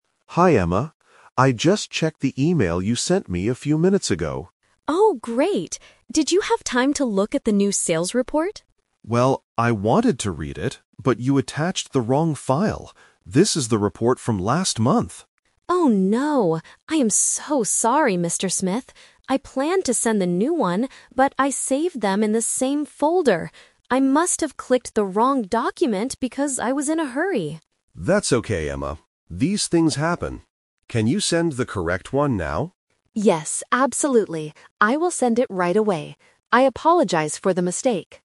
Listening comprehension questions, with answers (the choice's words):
Listen to the conversation and choose the correct answer (A, B, or C).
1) What file did Emma actually send to Mr. Smith?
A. The new sales report.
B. The report from last month.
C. An empty email.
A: The report from last month.

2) Why did Emma make this mistake?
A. She clicked the wrong document in her folder.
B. She didn't finish writing the new report.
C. Her computer stopped working suddenly.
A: She clicked the wrong document in her folder.

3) What will Emma do next?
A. Read the report from last month.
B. Send the correct document immediately.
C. Call the sales team.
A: Send the correct document immediately.

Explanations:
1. Mr. Smith says, "you attached the wrong file. This is the report from last month." Trap: Option (A) is the "Twist" trap. Emma planned and thought she sent the new report, but in reality, she didn't. Option (C) is a common email mistake, but it is not mentioned here.
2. Emma explains her mistake: "I saved them in the same folder. I must have clicked the wrong document..." Trap: Option (B) and (C) are plausible reasons for work problems, but they are not mentioned in the audio. The new report is already finished, she just clicked the wrong one.
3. When Mr. Smith asks her to send the correct one, Emma replies, "Yes, absolutely. I will send it right away." Trap: Option (A) uses words mentioned in the audio ("report from last month"), but Emma is not going to read it; she is going to send the new one.

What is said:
Mr. Smith: Hi Emma. I just checked the email you sent me a few minutes ago.
Emma: Oh, great! Did you have time to look at the new sales report?
Mr. Smith: Well, I wanted to read it, but you attached the wrong file. This is the report from last month.
Emma: Oh no! I am so sorry, Mr. Smith. I planned to send the new one, but I saved them in the same folder. I must have clicked the wrong document because I was in a hurry.
Mr. Smith: That's okay, Emma. These things happen. Can you send the correct one now?
Emma: Yes, absolutely. I will send it right away. I apologize for the mistake.